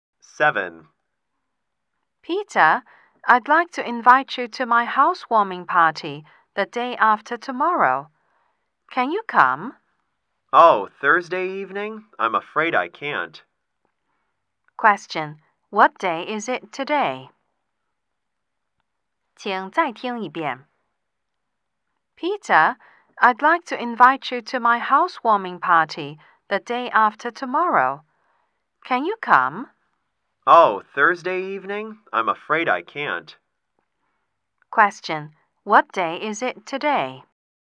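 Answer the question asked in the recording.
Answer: Tuesday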